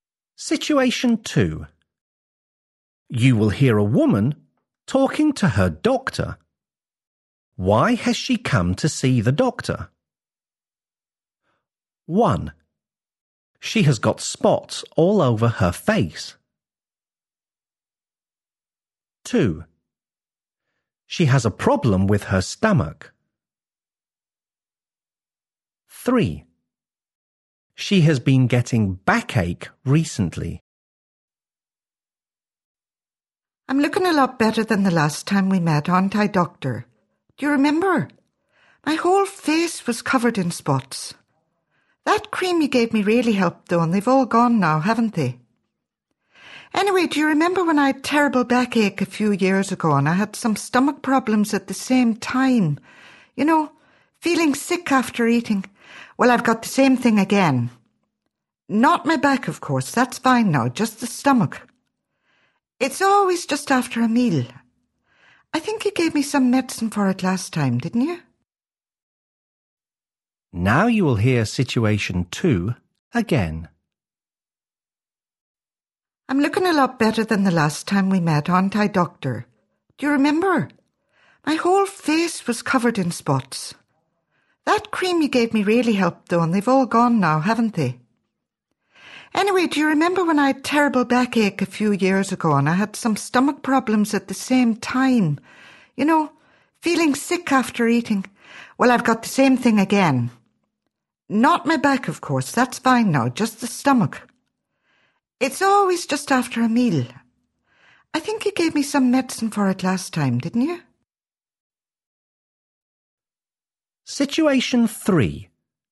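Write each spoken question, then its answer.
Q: Why has she come to see the doctor?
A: 2: She has a problem with her stomach.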